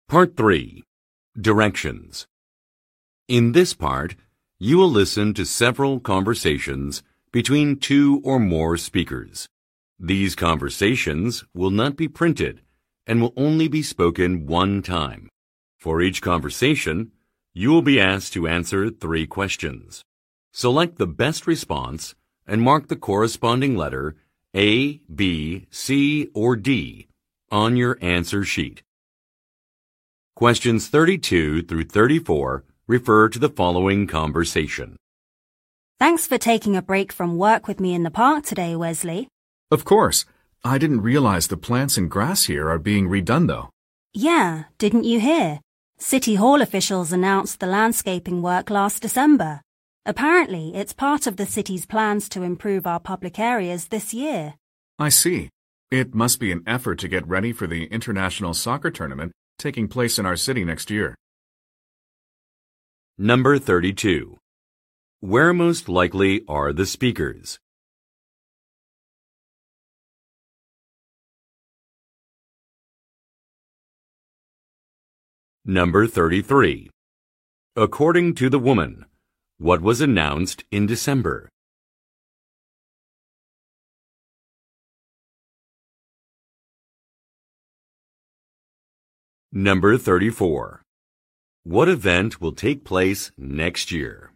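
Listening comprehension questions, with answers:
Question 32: Where most likely are the speakers?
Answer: In a park

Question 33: According to the woman, what was announced in December?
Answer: The improvement of public facilities

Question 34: What event will take place next year?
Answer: A sports competition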